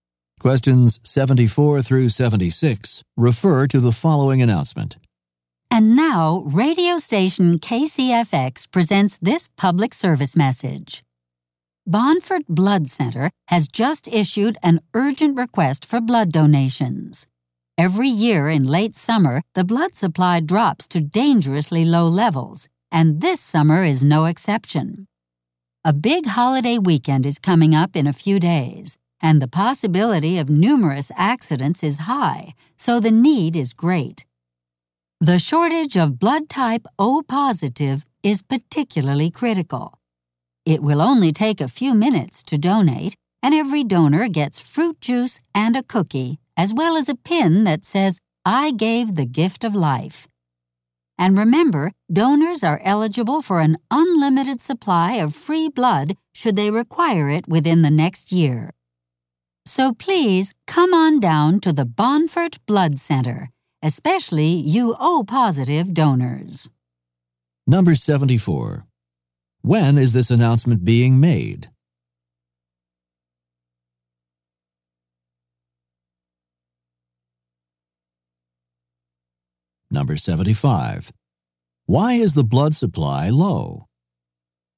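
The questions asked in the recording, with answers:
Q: When is this announcement being made?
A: In late summer, a few days before a holiday weekend

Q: Why is the blood supply low?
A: It always drops in late summer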